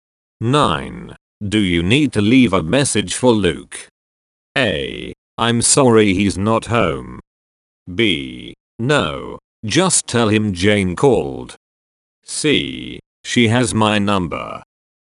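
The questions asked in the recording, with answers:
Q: Do you need to leave a message for Luke?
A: B: No, just tell him Jane called.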